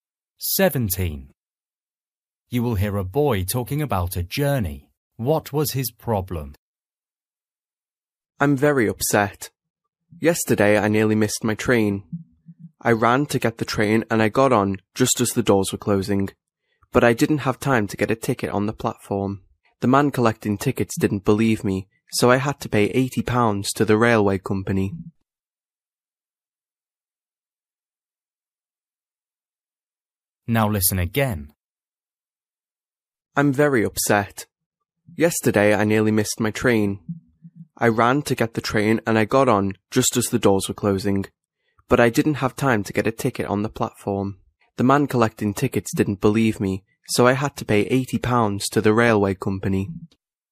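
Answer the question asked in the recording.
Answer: He had no ticket and had to pay £80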